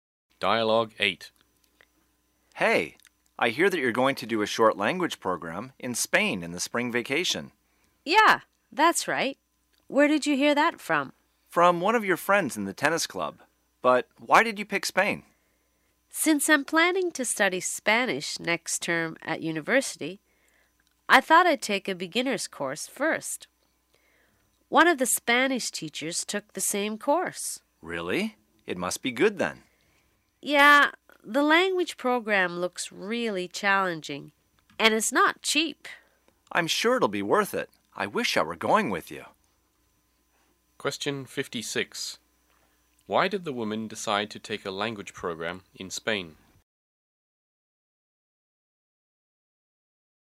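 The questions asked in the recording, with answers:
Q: Why did the woman decide to take a language program in Spain?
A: She plans to study Spanish next term and wants to take a beginner's course first.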